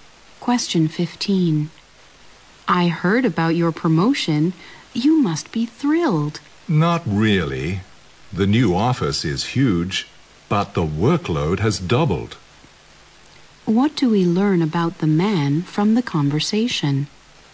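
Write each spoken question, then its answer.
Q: What do we learn about the man from the conversation?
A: He isn't happy about his promotion because his workload has doubled.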